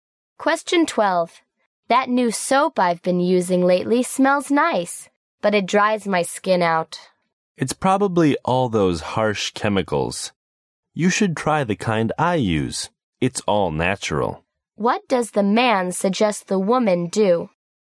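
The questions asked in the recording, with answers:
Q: What does the man suggest the woman do?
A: Try the natural soap he uses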